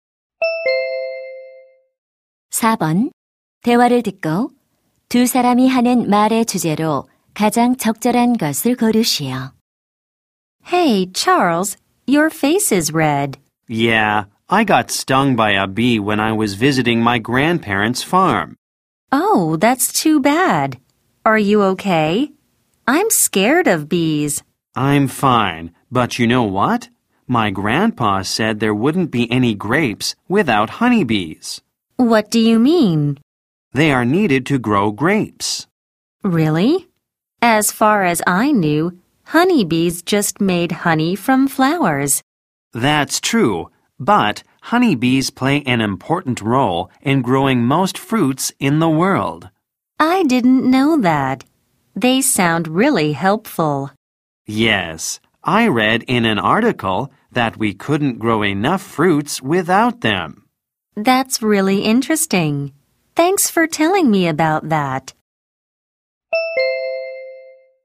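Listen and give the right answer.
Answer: 과일 재배에서 꿀벌의 중요한 역할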